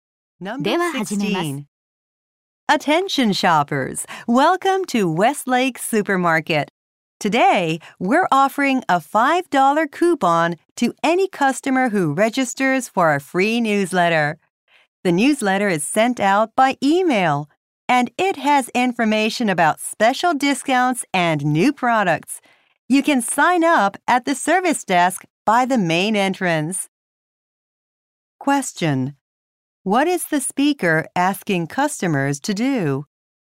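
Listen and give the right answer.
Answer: Register for the free newsletter.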